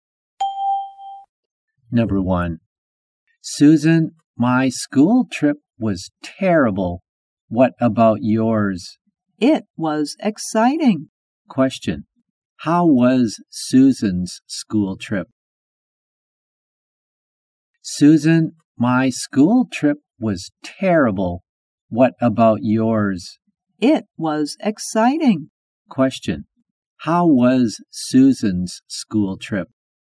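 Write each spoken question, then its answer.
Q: How was Susan's school trip?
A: It was exciting.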